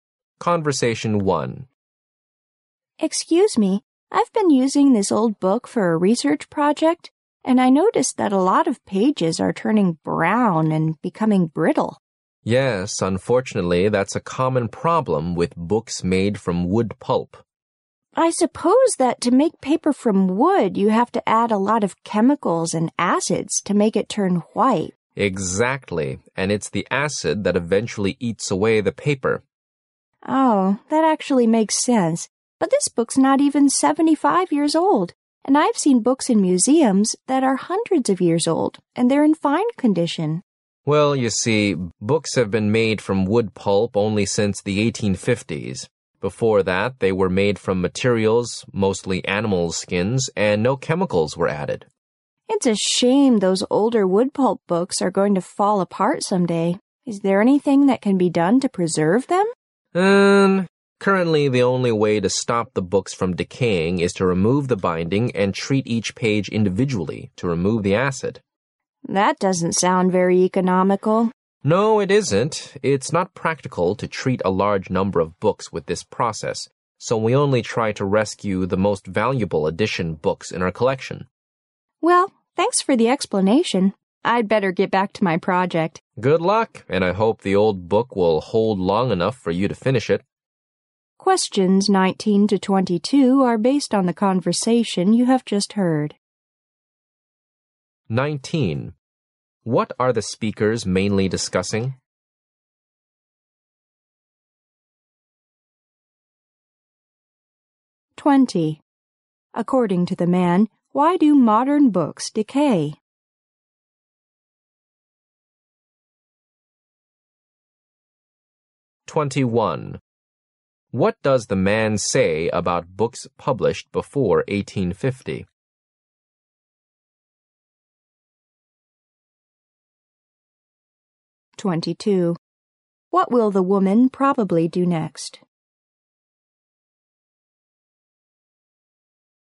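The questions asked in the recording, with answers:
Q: What are the speakers mainly discussing?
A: Why old wood-pulp books decay and how they can be preserved

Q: According to the man, why do modern books decay?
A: The acid added to wood-pulp paper eats away the paper

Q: What does the man say about books published before 1850?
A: They were made mostly from animal skins with no chemicals added, so they last

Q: What will the woman probably do next?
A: Go back to her research project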